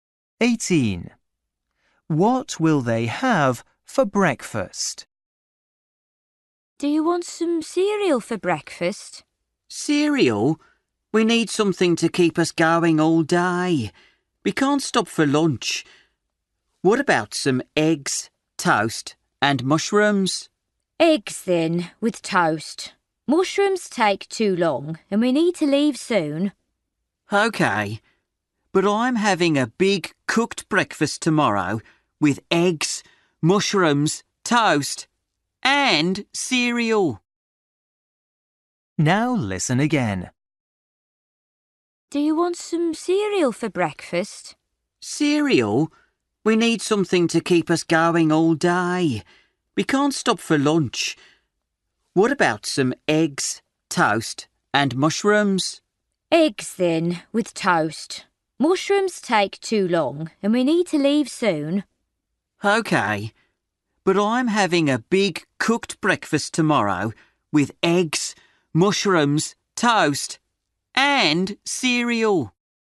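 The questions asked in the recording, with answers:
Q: What will they have for breakfast?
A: eggs and toast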